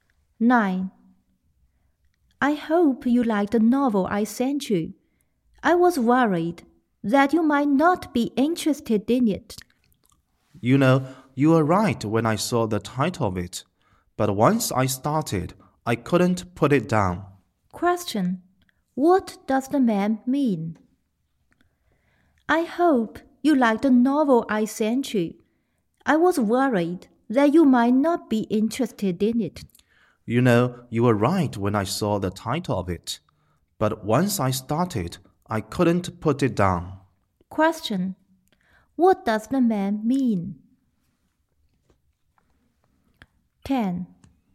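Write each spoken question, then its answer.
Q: What does the man mean?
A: He enjoyed the novel very much, though the title didn't interest him at first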